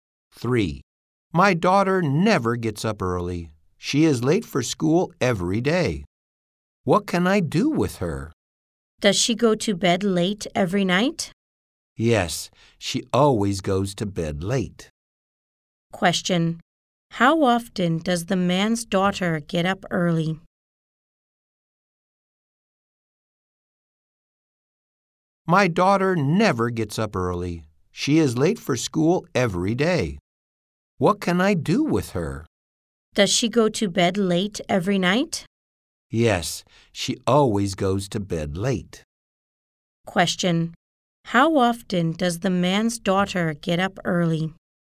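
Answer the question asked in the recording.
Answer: Never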